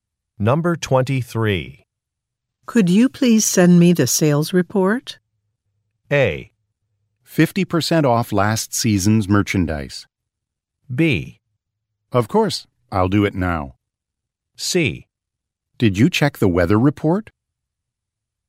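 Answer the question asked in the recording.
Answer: B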